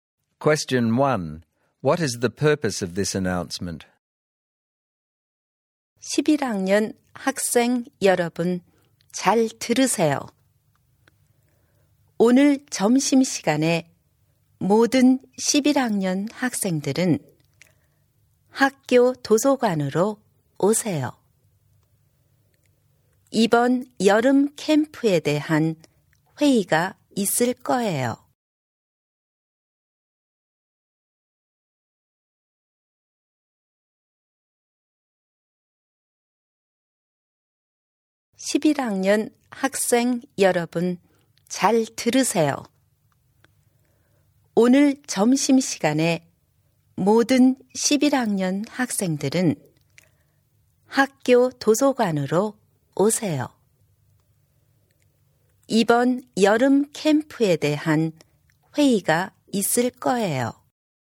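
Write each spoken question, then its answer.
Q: What is the purpose of this announcement?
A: To tell all Year 11 students to come to the school library at lunchtime for a meeting about the summer camp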